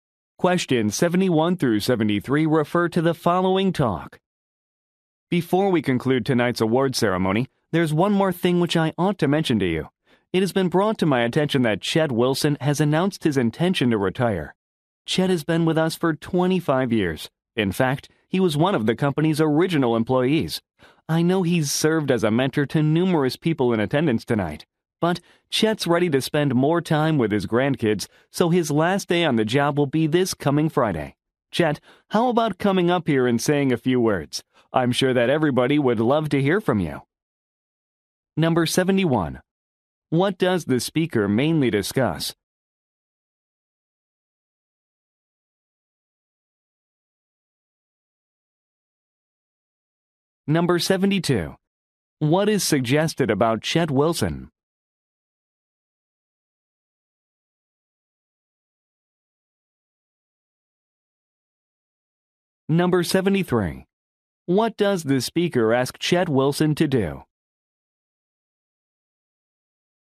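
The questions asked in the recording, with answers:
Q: What does the speaker mainly discuss?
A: Chet Wilson's retirement

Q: What is suggested about Chet Wilson?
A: He has worked at the company for 25 years as an original employee

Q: What does the speaker ask Chet Wilson to do?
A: Come up and say a few words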